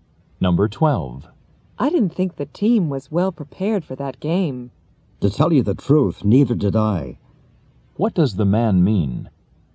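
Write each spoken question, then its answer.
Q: What does the man mean?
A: He also thinks the team wasn't well prepared.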